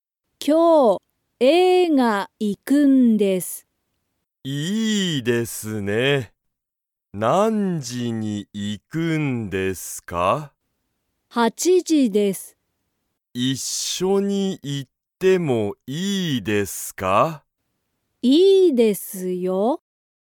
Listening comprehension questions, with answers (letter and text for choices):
カレンとケンタは、今日一緒(きょういっしょ)に映画(えいが)に行(い)きますか?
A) はい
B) いいえ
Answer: A) はい

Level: Level 1